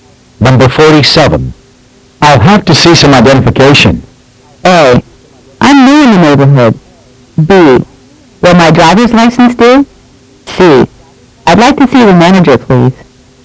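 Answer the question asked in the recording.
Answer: B: Will my driver's license do?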